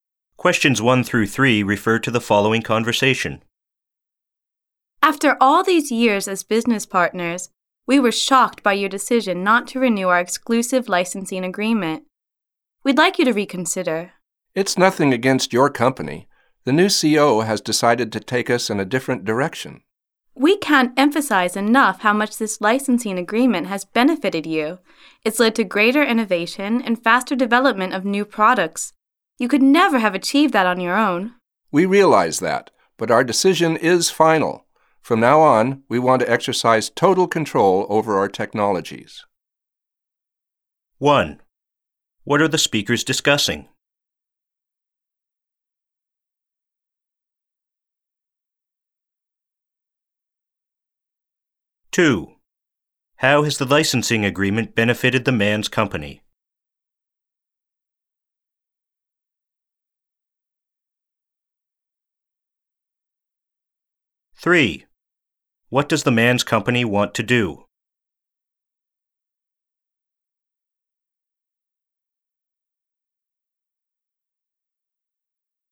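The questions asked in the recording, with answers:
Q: What are the speakers discussing?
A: The decision not to renew their exclusive licensing agreement

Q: How has the licensing agreement benefited the man's company?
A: It led to greater innovation and faster development of new products

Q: What does the man's company want to do?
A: Exercise total control over its technologies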